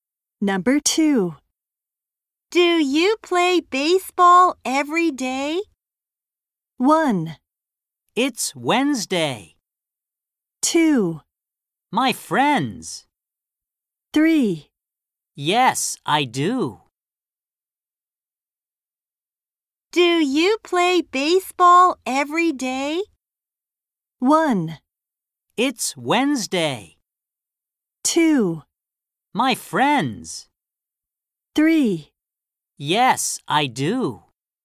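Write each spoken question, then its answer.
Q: Do you play baseball every day?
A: 3: Yes, I do.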